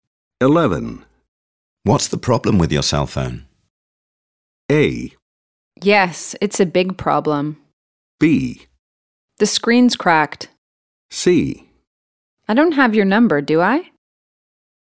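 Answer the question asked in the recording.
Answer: B: The screen's cracked.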